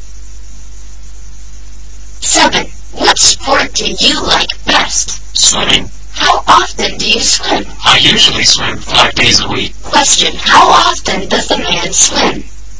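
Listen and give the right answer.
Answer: Five days a week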